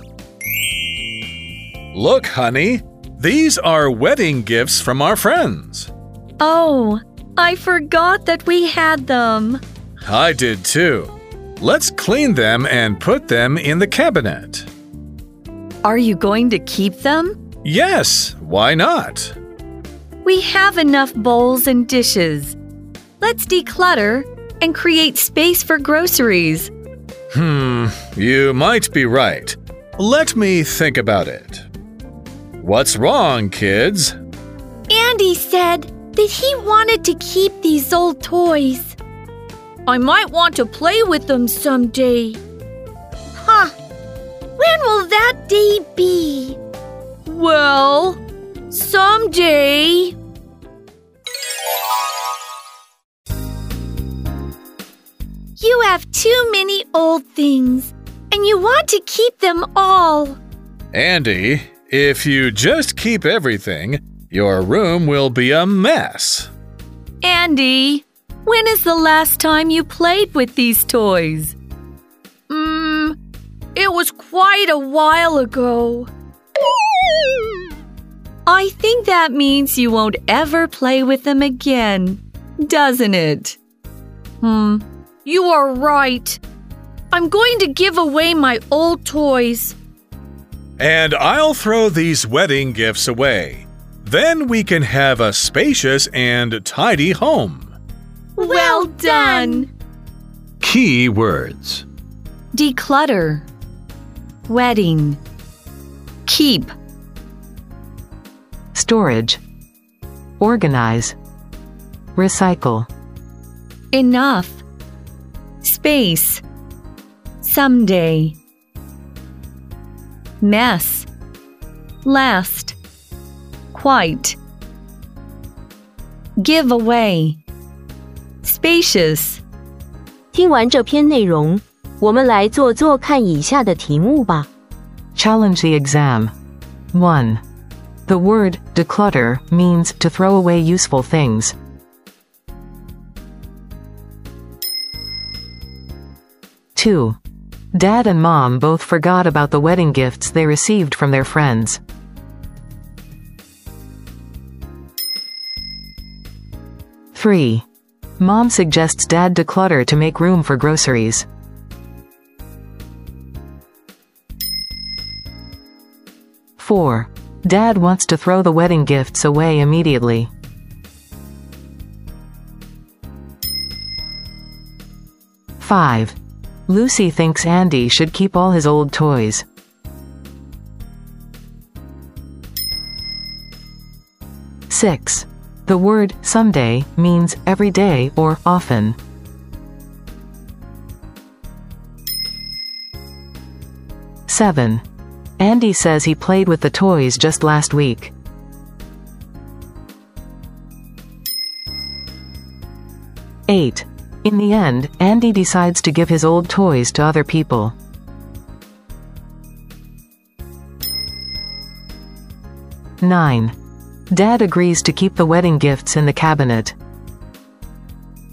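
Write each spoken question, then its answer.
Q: The word declutter means to throw away useful things.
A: False

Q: Dad and Mom both forgot about the wedding gifts they received from their friends.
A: True

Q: Lucy thinks Andy should keep all his old toys.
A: False

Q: The word someday means every day or often.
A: False

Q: Andy says he played with the toys just last week.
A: False

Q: In the end, Andy decides to give his old toys to other people.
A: True

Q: Dad agrees to keep the wedding gifts in the cabinet.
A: False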